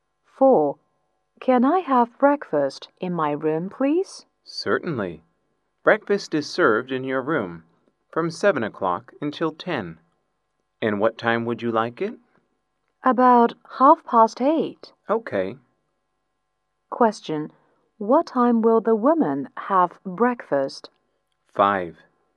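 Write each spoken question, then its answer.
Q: Question. What time will the woman have breakfast?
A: About 8:30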